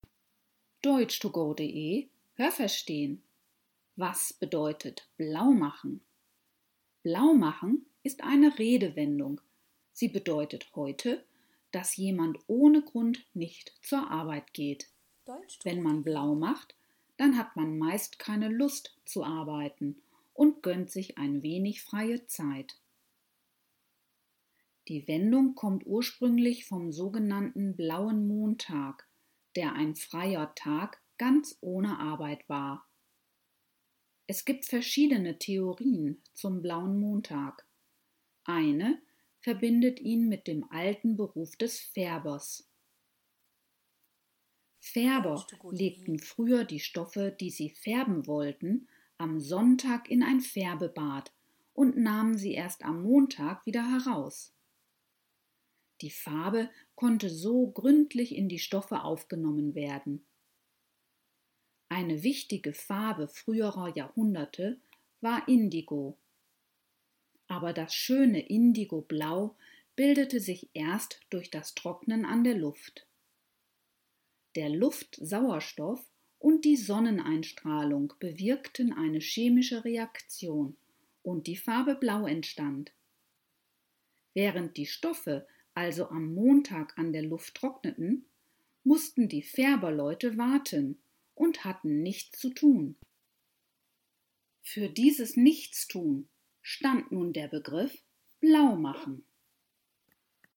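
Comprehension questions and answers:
Haben Sie das gehört? Stimmt diese Aussage?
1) Wer in der heutigen Zeit „blaumacht", bleibt grundlos der Arbeit fern.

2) Am sogenannten Blauen Montag musste manchmal nicht gearbeitet werden.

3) Eine Theorie zum Blauen Montag bringt ihn in Zusammenhang mit dem Beruf des Fahrers.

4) Die zu färbenden Stoffe kamen sonntags in ein Färbebad und wurden montags wieder herausgeholt.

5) Die Farbe Blau in den Stoffen bildete sich beim Trocknen vor dem Ofen.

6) Die Färbersleute haben an den Montagen gleich neue Stoffe ins Färbebad gelegt.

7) Aus dem montäglichen Nichtstun der Färbersleute entstand nach dieser Theorie der Begriff „blaumachen".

Welche Präposition passt?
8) Die Redewendung bedeutet heute, dass jemand ohne Grund nicht _____ Arbeit geht.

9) Die Wendung kommt ursprünglich _____ sogenannten Blauen Montag.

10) Eine Theorie verbindet sie _____ dem alten Beruf des Färbers.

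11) Die Farbe konnte so gründlich _____ die Stoffe aufgenommen werden.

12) Das schöne Indigoblau bildete sich erst _____ das Trocknen an der Luft.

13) Die Stoffe mussten _____ der Luft trocknen.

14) _____ das Nichtstun, während die Stoffe trockneten, stand nun der Begriff „blaumachen".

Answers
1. Richtig
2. Falsch
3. Falsch
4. Richtig
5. Falsch
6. Falsch
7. Richtig
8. zur
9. vom
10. mit
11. in
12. durch
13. an
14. Für

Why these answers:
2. Es musste nie gearbeitet werden, es war ein freier Tag.
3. Mit dem Beruf des Färbers, der früher Stoffe färbte.
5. Sie bildete sich beim Trocknen an der Luft. Auch die Sonneneinstrahlung war hierbei wichtig.
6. Sie hatten nichts zu tun und mussten warten, bis die Stoffe vom Sonntag trocken waren.

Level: B (mittel)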